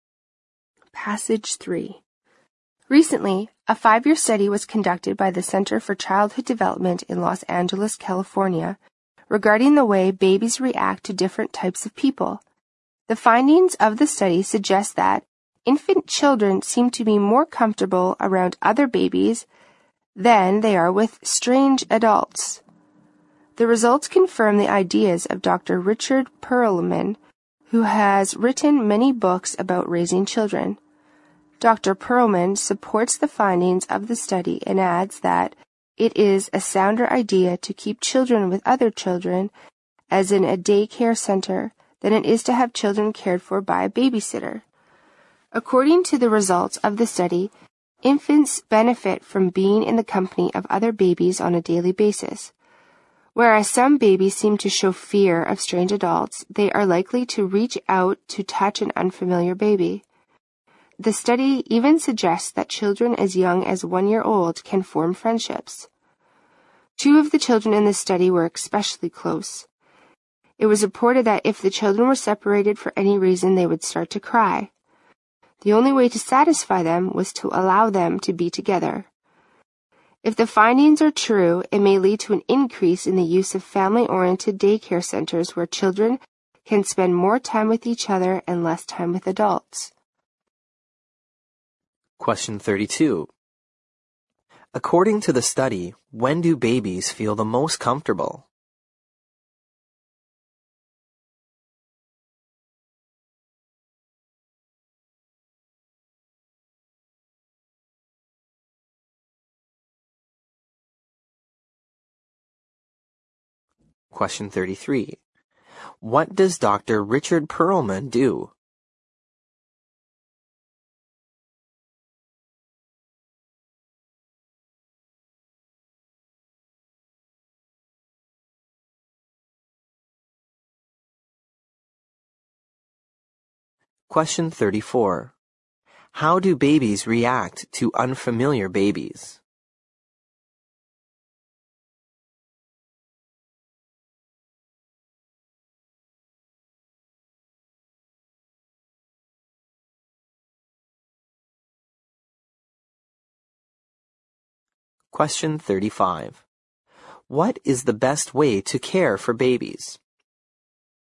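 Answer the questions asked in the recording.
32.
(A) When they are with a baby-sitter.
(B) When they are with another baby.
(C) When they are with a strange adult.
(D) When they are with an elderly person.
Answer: (B) When they are with another baby.
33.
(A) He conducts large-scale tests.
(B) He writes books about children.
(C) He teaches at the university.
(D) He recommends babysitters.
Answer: (B) He writes books about children.
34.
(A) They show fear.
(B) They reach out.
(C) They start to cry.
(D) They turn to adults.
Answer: (B) They reach out.
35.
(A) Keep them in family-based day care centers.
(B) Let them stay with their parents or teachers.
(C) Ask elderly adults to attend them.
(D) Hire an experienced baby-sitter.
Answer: (A) Keep them in family-based day care centers.

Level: 六级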